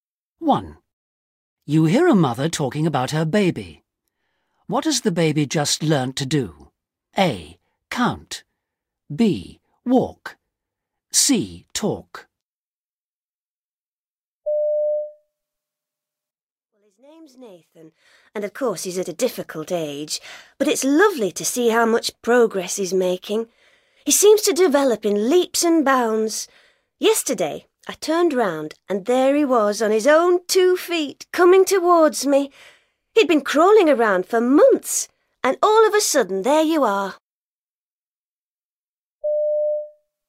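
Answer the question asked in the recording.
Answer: B: Walk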